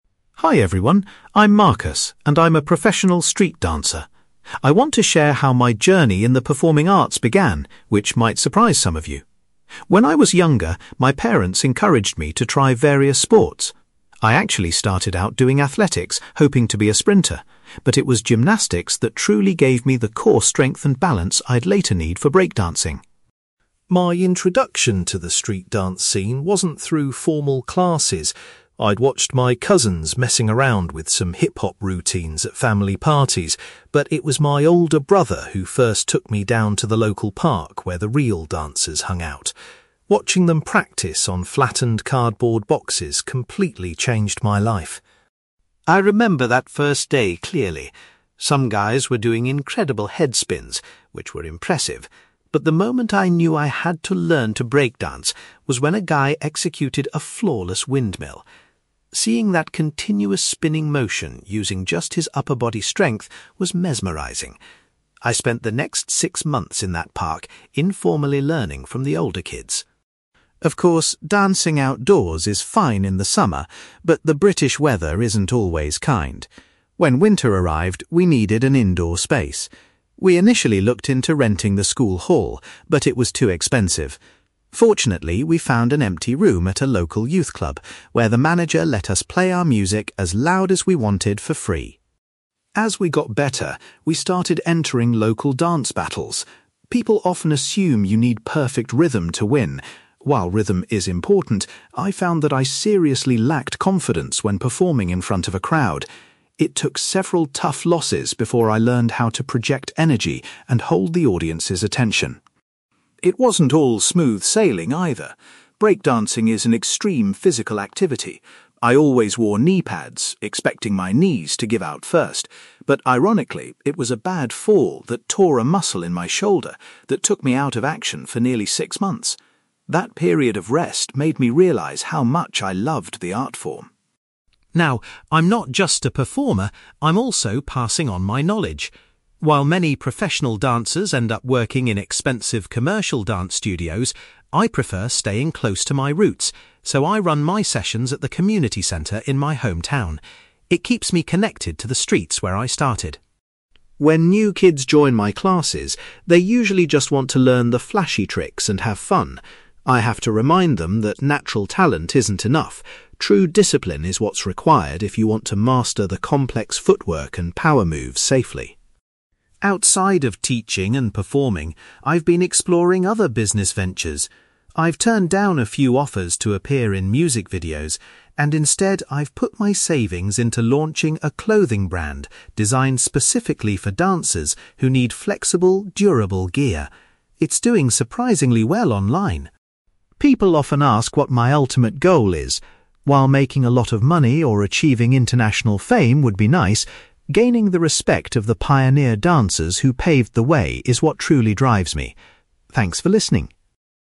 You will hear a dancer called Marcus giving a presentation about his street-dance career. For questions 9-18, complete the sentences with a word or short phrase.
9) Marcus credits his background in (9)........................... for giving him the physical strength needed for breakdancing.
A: gymnastics

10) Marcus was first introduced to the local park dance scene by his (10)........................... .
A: older brother

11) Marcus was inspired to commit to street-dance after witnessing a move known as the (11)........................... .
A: windmill

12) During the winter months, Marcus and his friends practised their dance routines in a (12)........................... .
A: youth club

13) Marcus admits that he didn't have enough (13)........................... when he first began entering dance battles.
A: confidence

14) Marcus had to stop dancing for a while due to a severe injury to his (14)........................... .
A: shoulder

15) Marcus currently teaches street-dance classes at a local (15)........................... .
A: community centre

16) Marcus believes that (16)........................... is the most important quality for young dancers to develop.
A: discipline

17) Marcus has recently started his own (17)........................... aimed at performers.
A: clothing brand

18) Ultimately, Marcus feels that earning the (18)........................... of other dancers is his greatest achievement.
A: respect

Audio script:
Marcus: Hi everyone. I'm Marcus, and I'm a professional street-dancer. I want to share how my journey in the performing arts began, which might surprise some of you. When I was younger, my parents encouraged me to try various sports. I actually started out doing athletics, hoping to be a sprinter, but it was gymnastics that truly gave me the core strength and balance I'd later need for breakdancing.
My introduction to the street-dance scene wasn't through formal classes. I'd watched my cousins messing around with some hip-hop routines at family parties, but it was my older brother who first took me down to the local park where the real dancers hung out. Watching them practice on flattened cardboard boxes completely changed my life.
I remember that first day clearly. Some guys were doing incredible headspins, which were impressive, but the moment I knew I had to learn to breakdance was when a guy executed a flawless windmill. Seeing that continuous spinning motion using just his upper body strength was mesmerising. I spent the next six months in that park, informally learning from the older kids.
Of course, dancing outdoors is fine in the summer, but the British weather isn't always kind. When winter arrived, we needed an indoor space. We initially looked into renting the school hall, but it was too expensive. Fortunately, we found an empty room at a local youth club where the manager let us play our music as loud as we wanted for free.
As we got better, we started entering local dance battles. People often assume you need perfect rhythm to win. While rhythm is important, I found that I seriously lacked confidence when performing in front of a crowd. It took several tough losses before I learned how to project energy and hold the audience's attention.
It wasn't all smooth sailing, either. Breakdancing is an extreme physical activity. I always wore kneepads, expecting my knees to give out first, but ironically, it was a bad fall that tore a muscle in my shoulder that took me out of action for nearly six months. That period of rest made me realise how much I loved the art form.
Now, I'm not just a performer; I'm also passing on my knowledge. While many professional dancers end up working in expensive commercial dance studios, I prefer staying close to my roots, so I run my sessions at the community centre in my hometown. It keeps me connected to the streets where I started.
When new kids join my classes, they usually just want to learn the flashy tricks and have fun. I have to remind them that natural talent isn't enough; true discipline is what's required if you want to master the complex footwork and power moves safely.
Outside of teaching and performing, I've been exploring other business ventures. I've turned down a few offers to appear in music videos, and instead, I've put my savings into launching a clothing brand designed specifically for dancers who need flexible, durable gear. It's doing surprisingly well online!
People often ask what my ultimate goal is. While making a lot of money or achieving international fame would be nice, gaining the respect of the pioneer dancers who paved the way is what truly drives me. Thanks for listening!

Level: B2